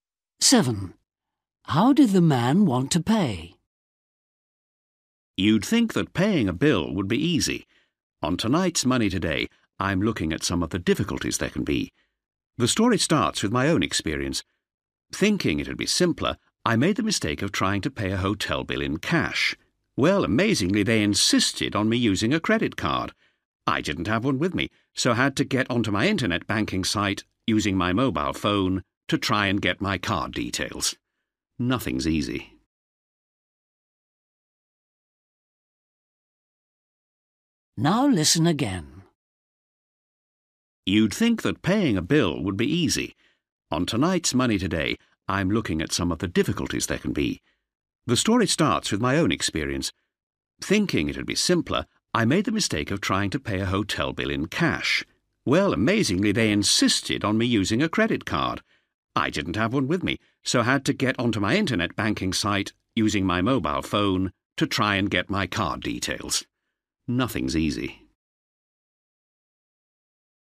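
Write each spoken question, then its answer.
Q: How did the man want to pay?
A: in cash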